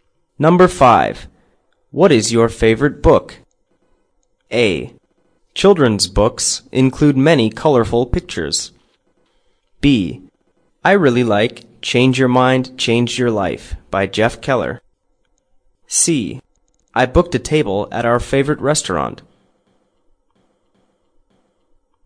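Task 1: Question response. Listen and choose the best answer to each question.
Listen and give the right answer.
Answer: I really like Change Your Mind, Change Your Life by Jeff Keller.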